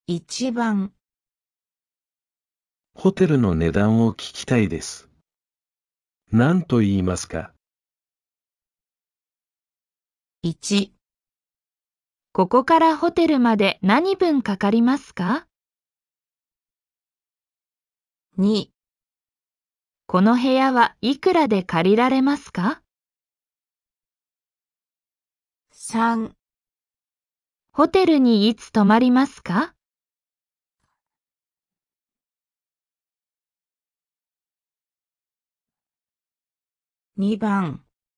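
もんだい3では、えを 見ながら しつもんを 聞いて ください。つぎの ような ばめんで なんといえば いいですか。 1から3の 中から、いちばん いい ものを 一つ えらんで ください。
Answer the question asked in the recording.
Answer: 2

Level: N4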